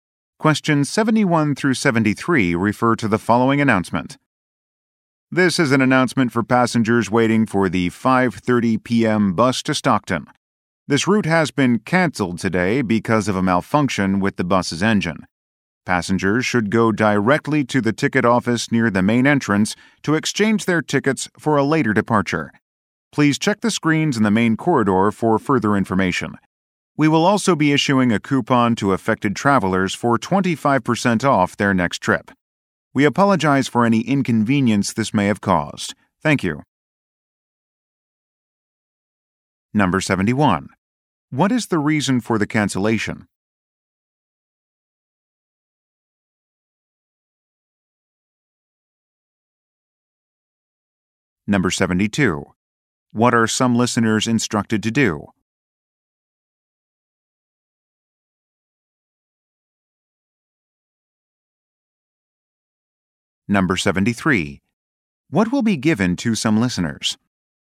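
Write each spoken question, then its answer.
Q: What is the reason for the cancellation?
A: A malfunction with the bus's engine

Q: What are some listeners instructed to do?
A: Go to the ticket office to exchange their tickets

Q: What will be given to some listeners?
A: A coupon for 25% off their next trip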